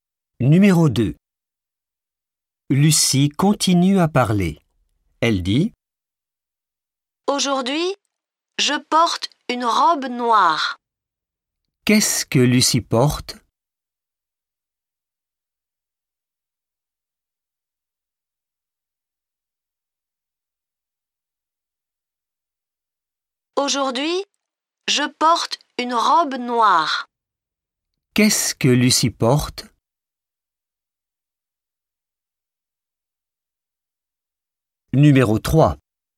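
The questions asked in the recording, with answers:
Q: Qu'est-ce que Lucie porte?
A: Une robe noire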